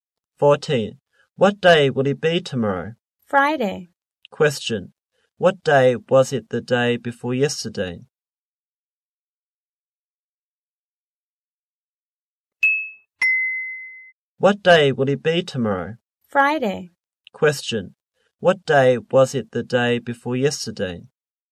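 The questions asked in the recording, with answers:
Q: What day was it the day before yesterday?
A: Tuesday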